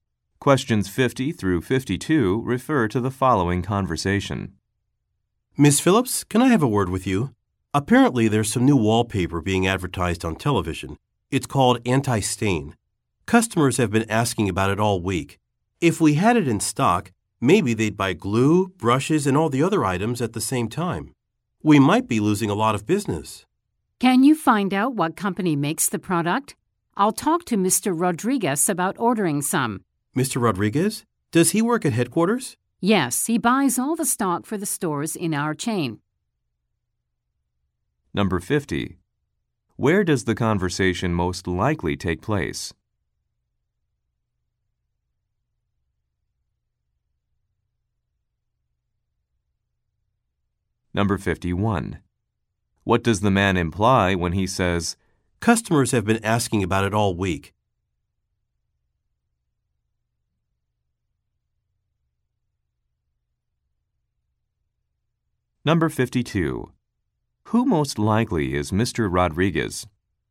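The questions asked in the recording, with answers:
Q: Where does the conversation most likely take place?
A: At a store that sells wallpaper and decorating supplies

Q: What does the man imply when he says,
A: The store should stock the product

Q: Who most likely is Mr.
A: The buyer for the store chain at headquarters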